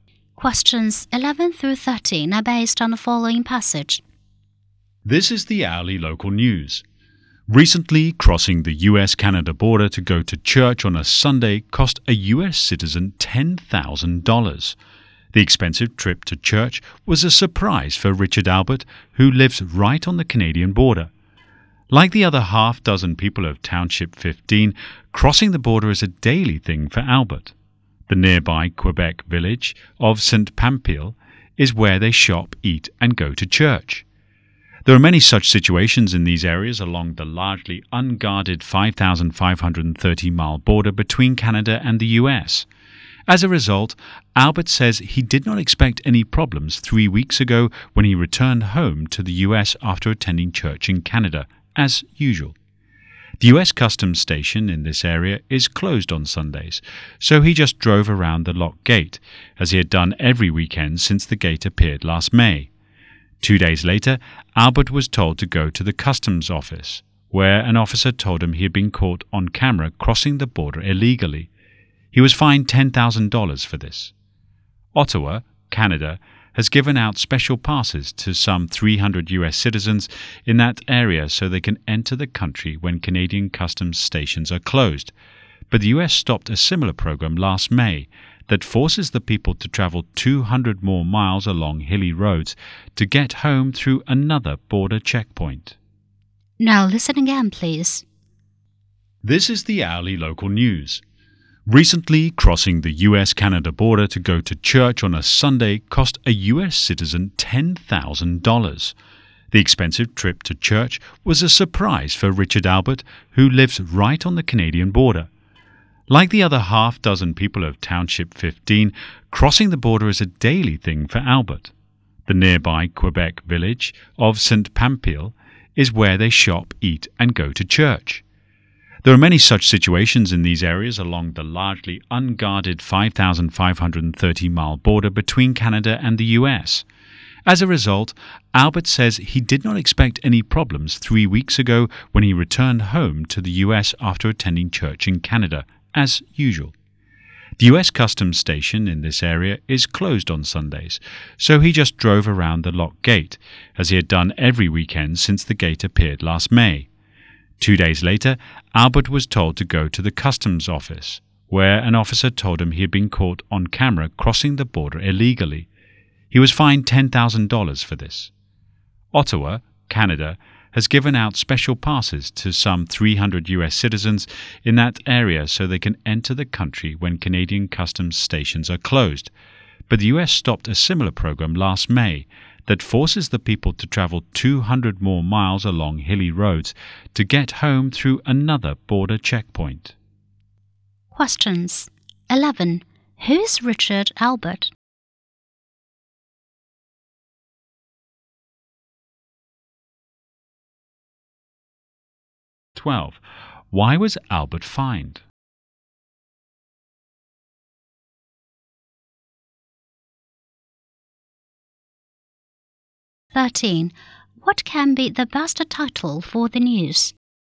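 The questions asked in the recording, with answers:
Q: Who is Richard Albert?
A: A US citizen living on the Canadian border

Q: Why was Albert fined?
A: He crossed the border illegally by driving around the locked customs gate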